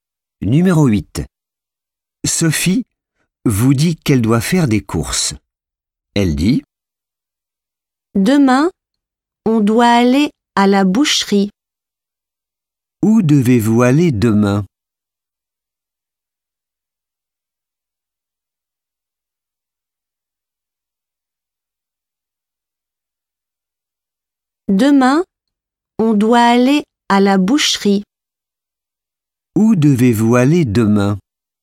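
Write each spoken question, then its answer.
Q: Où devez-vous aller demain?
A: à la boucherie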